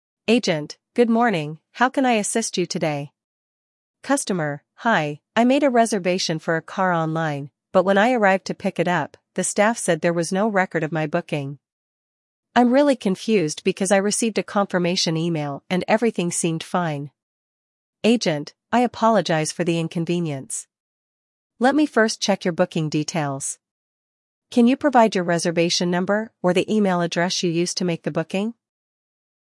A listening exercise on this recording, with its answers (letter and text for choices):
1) What is the customer's initial issue?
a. The car is damaged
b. The car is not available for pick-up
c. The booking is missing in the system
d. The booking was for the wrong car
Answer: c. The booking is missing in the system

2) What does the customer want the agent to do?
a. Issue a refund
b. Resolve the booking issue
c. Offer a different car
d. Cancel the reservation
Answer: b. Resolve the booking issue

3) What information does the agent ask from the customer?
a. Booking ID or email address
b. Credit card details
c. Proof of payment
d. Booking date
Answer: a. Booking ID or email address

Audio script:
Agent: "Good morning, how can I assist you today?"
Customer: "Hi, I made a reservation for a car online, but when I arrived to pick it up, the staff said there was no record of my booking. I'm really confused because I received a confirmation email and everything seemed fine."
Agent: "I apologize for the inconvenience. Let me first check your booking details. Can you provide your reservation number or the email address you used to make the booking?"